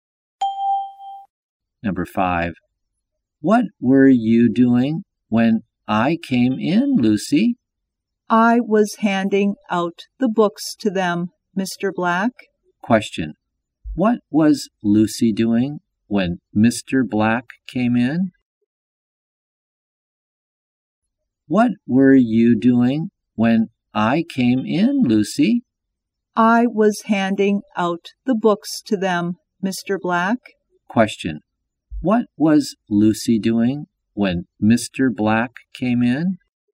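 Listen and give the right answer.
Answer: Handing out the books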